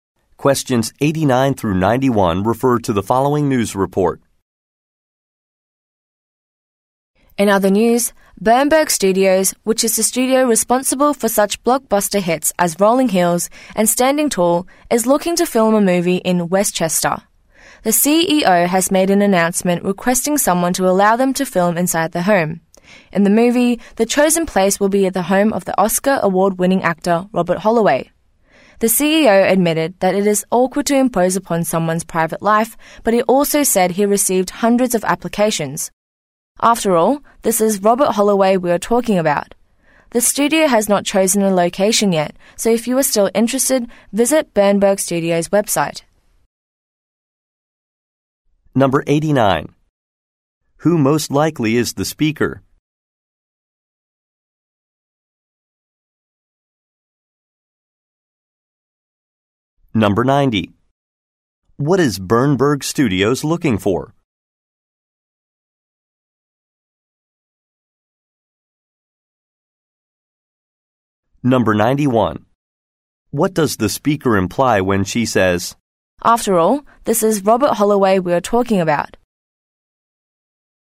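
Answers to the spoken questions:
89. A news reporter
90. A home to film a movie in
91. Many people want to be involved because the actor is famous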